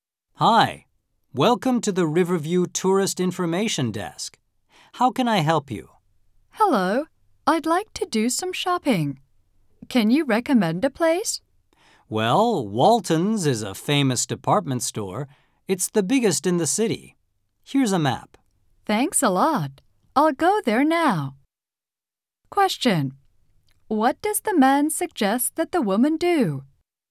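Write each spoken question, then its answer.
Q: What does the man suggest that the woman do?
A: Go shopping at Walton's, the city's biggest department store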